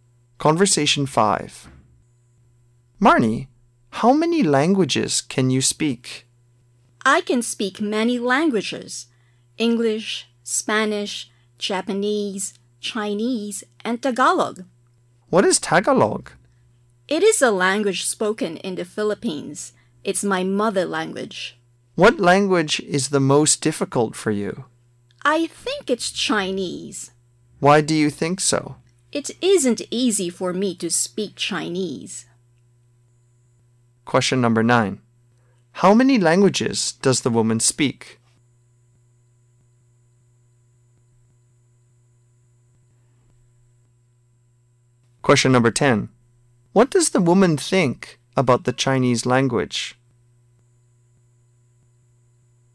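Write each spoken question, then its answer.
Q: How many languages does the woman speak?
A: Five

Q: What does the woman think about the Chinese language?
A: It is the most difficult; not easy to speak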